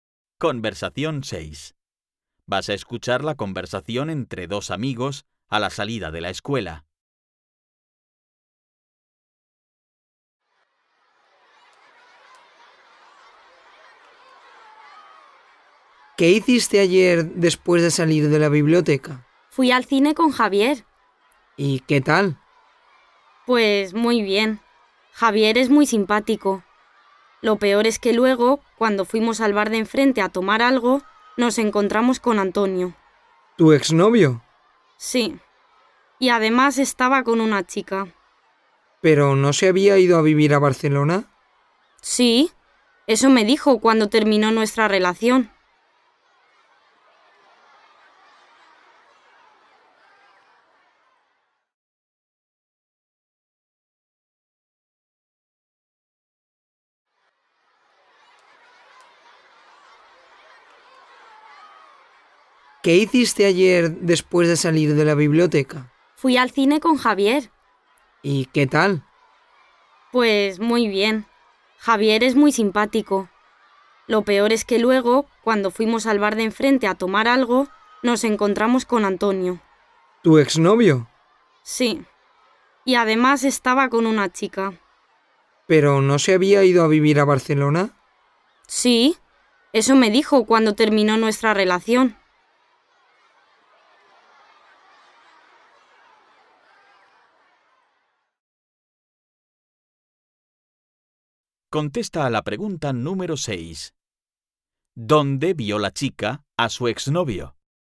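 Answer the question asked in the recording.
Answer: En el bar de enfrente del cine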